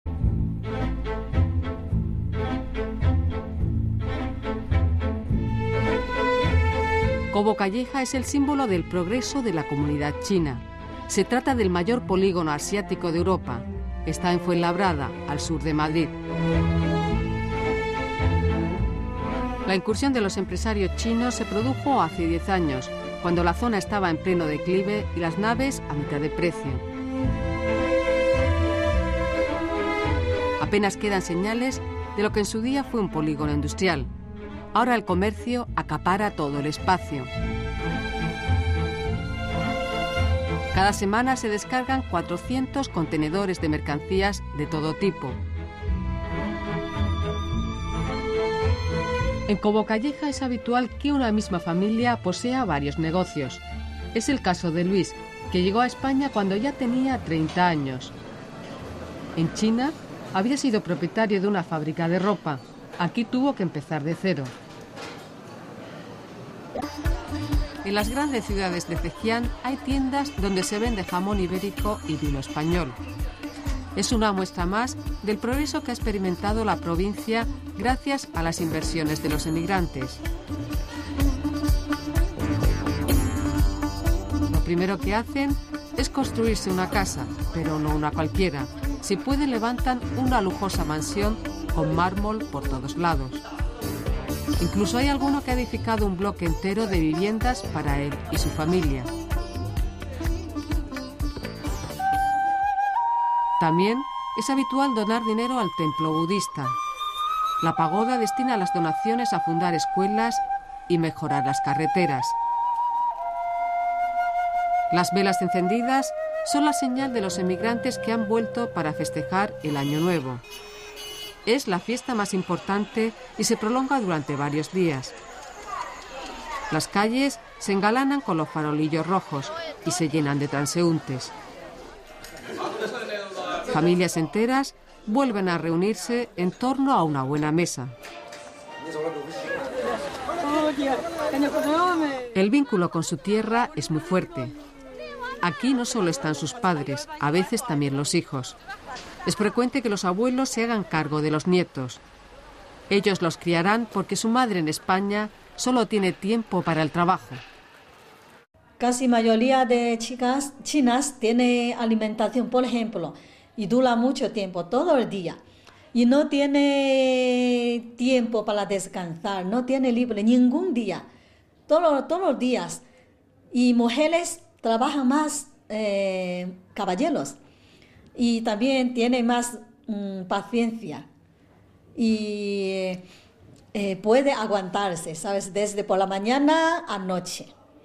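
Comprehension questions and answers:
Escucha y contesta las preguntas.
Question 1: ¿Qué es Cobo Calleja ahora y qué fue antes?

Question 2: Zhejiang también ha cambiado. ¿De qué cambios se trata y cuál es su origen?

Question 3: ¿Qué nos dicen sobre las mujeres y los niños de los emigrantes chinos?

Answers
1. Ahora es el mayor polígono comercial asiático de Europa, en Fuenlabrada; antes fue un polígono industrial.
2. Hay progreso: tiendas con jamón ibérico y vino español, lujosas mansiones, donaciones para escuelas y carreteras; su origen son las inversiones de los emigrantes.
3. Los abuelos crían a los niños en China porque las madres en España solo tienen tiempo para trabajar; las mujeres trabajan todo el día sin días libres, más que los hombres, y tienen más paciencia.

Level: 中高级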